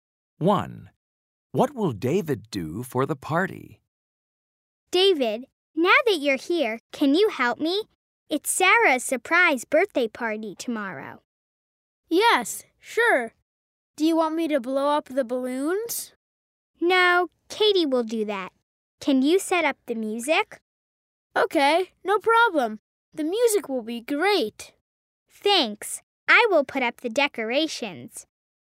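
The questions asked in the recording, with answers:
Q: What will David do for the party?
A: Set up the music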